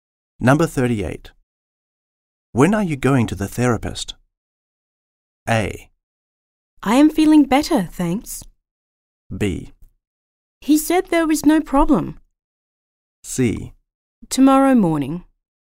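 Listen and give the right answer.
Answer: C: Tomorrow morning.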